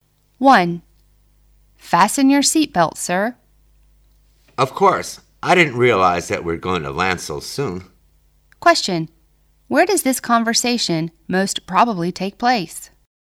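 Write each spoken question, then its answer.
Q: Where does this conversation most probably take place?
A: On a plane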